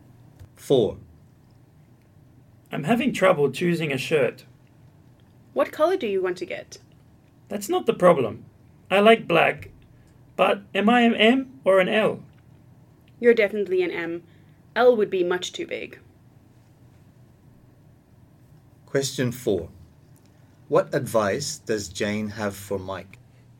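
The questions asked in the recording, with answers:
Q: What advice does Jane have for Mike?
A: To get a size M shirt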